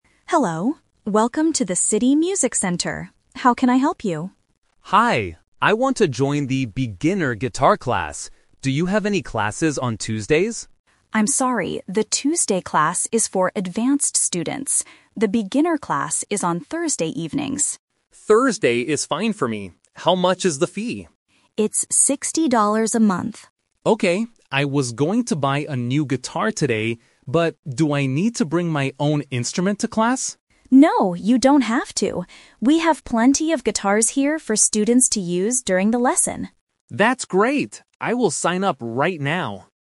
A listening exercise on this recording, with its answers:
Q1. When is the beginner guitar class?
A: Thursday evenings.

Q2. How much does the guitar class cost for a month?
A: $60

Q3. What does the student need to bring to the class?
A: He doesn't need to bring an instrument.

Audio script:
Receptionist: Hello, welcome to the City Music Center. How can I help you?
Student: Hi, I want to join the beginner guitar class. Do you have any classes on Tuesdays?
Receptionist: I'm sorry, the Tuesday class is for advanced students. The beginner class is on Thursday evenings.
Student: Thursday is fine for me. How much is the fee?
Receptionist: It's $60 a month.
Student: Okay. I was going to buy a new guitar today, but do I need to bring my own instrument to class?
Receptionist: No, you don't have to. We have plenty of guitars here for students to use during the lesson.